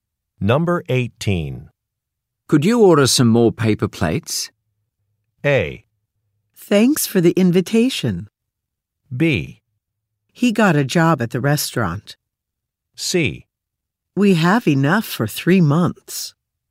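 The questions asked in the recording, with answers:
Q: Could you order some more paper plates?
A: C: We have enough for 3 months.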